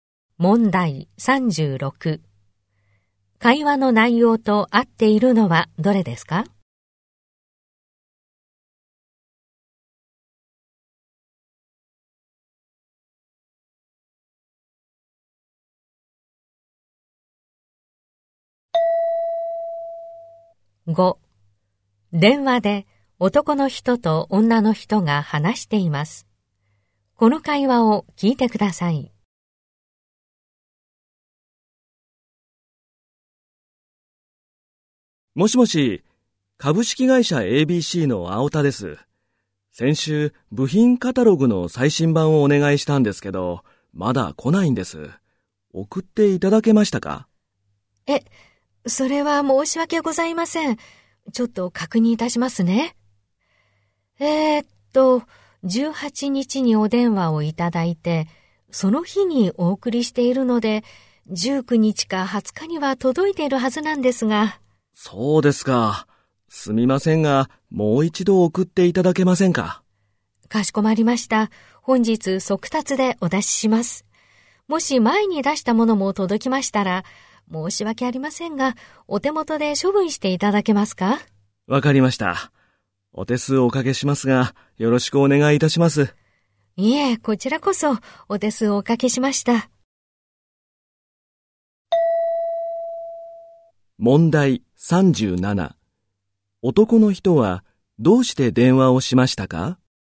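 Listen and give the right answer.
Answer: 頼んだ部品カタログがまだ届かないから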